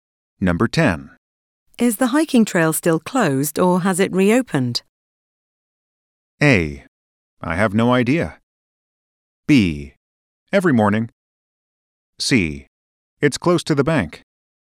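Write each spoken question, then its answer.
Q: Is the hiking trail still closed or has it reopened?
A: A: I have no idea.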